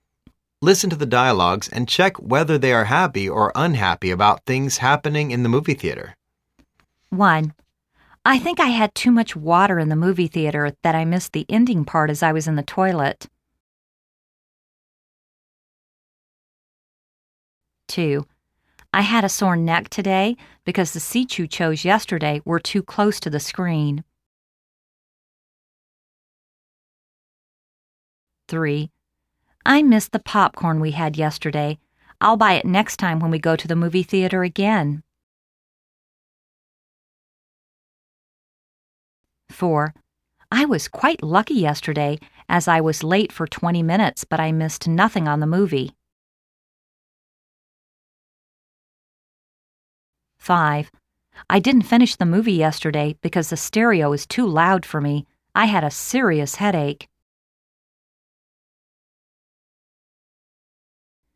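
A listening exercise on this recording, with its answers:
Listen to the dialogues and check whether they are happy or unhappy about things happening in the movie theater.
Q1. I think I had too much water in the movie theater that I missed the ending part as I was in the toilet.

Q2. I had a sore neck today because the seats you chose yesterday were too close to the screen.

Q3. I miss the popcorn we had yesterday. l'II buy it next time when we go to the movie theater again.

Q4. I was quite lucky yesterday as I was late for 20 minutes but I missed nothing on the movie.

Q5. I didn't finish the movie yesterday because the stereo is too loud for me. I had a serious headache.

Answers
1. unhappy
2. unhappy
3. happy
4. happy
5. unhappy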